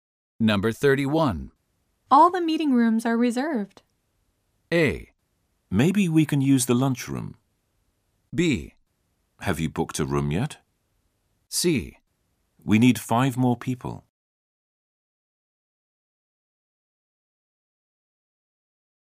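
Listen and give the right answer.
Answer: A: Maybe we can use the lunchroom.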